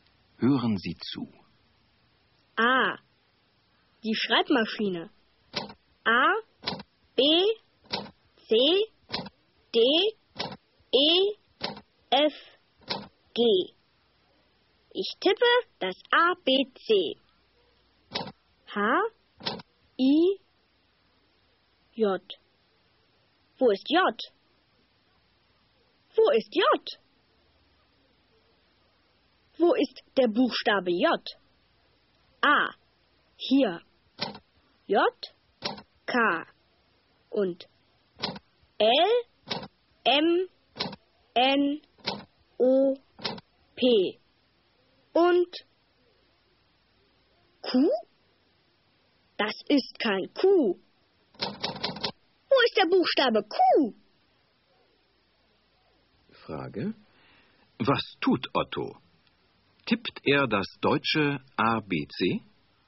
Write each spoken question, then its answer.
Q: Was tut Otto? Tippt er das deutsche ABC?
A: Ja, er tippt das deutsche ABC.